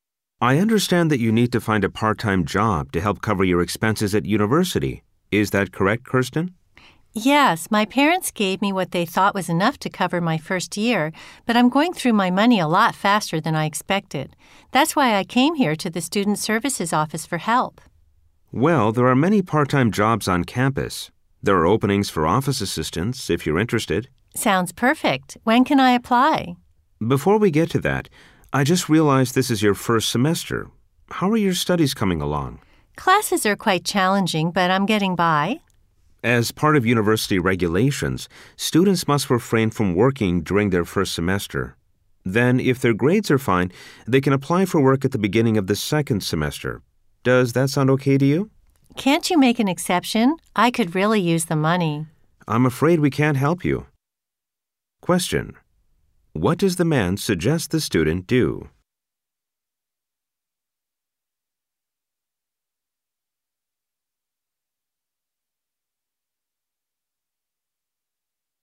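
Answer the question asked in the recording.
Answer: Wait until the beginning of the second semester to apply for a job, if her grades are fine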